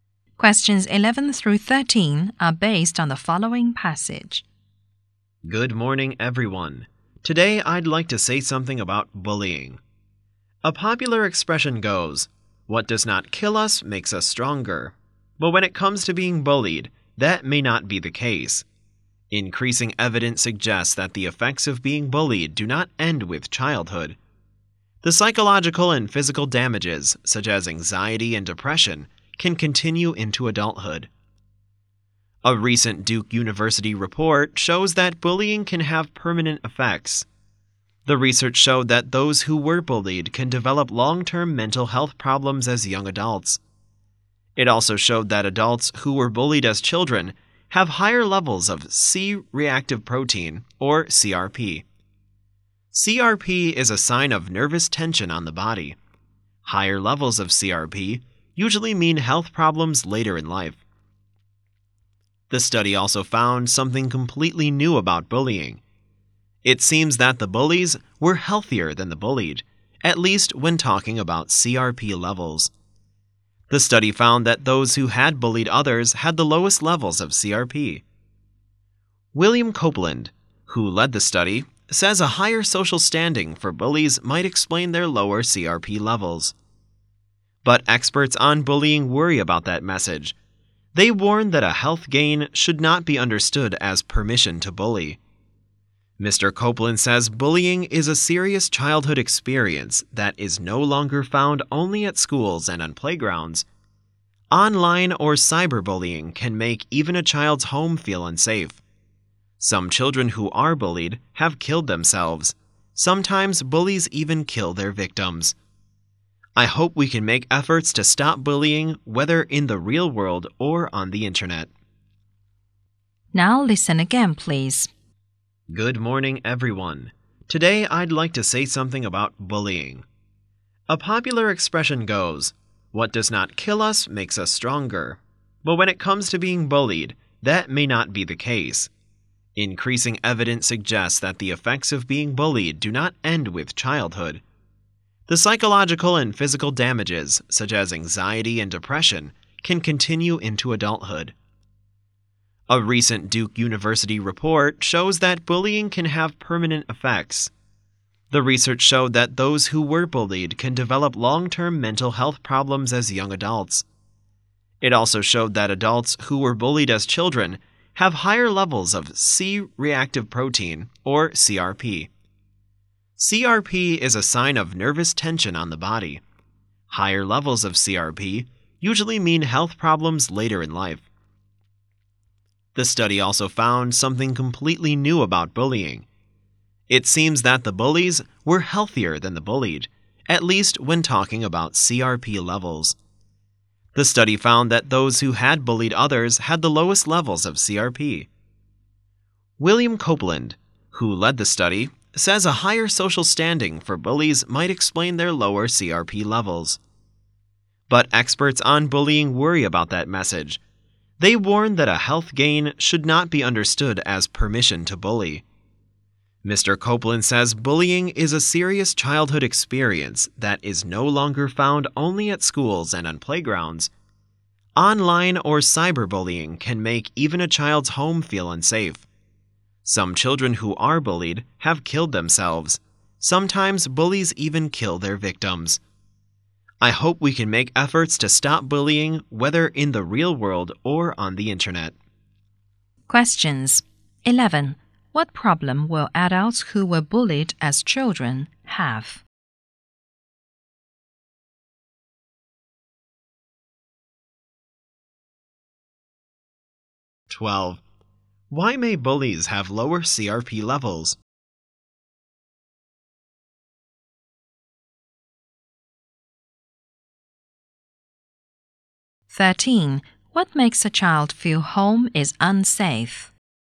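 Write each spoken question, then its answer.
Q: What problem will adults who were bullied as children have?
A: Long-term mental health problems and higher CRP levels

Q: Why may bullies have lower CRP levels?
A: Because of their higher social standing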